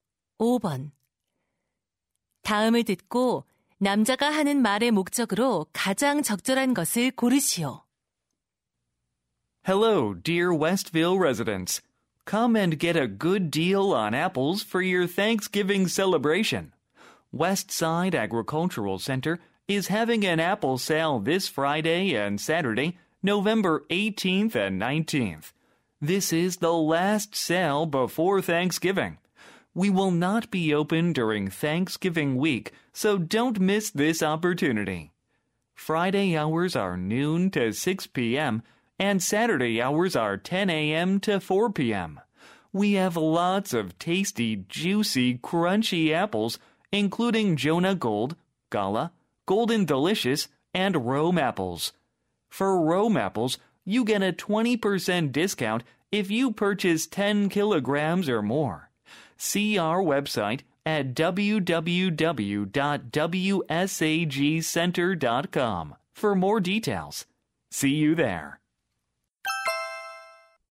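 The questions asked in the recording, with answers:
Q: 다음을 듣고 남자가 하는 말의 목적으로 가장 적절한 것을 고르시오.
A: 사과 할인 판매 행사를 홍보하려고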